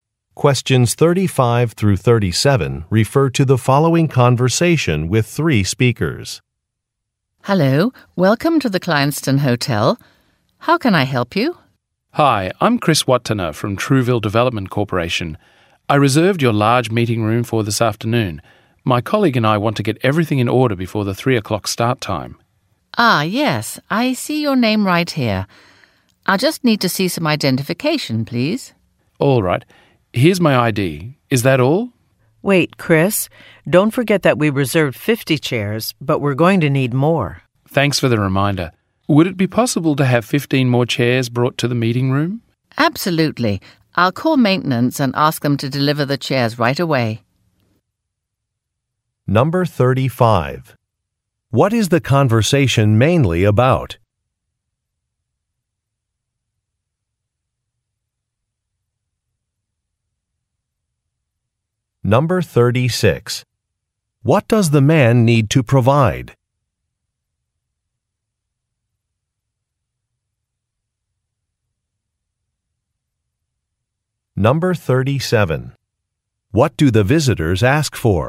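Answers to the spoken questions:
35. Getting ready to use a reserved hotel meeting room
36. Identification (his ID)
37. 15 more chairs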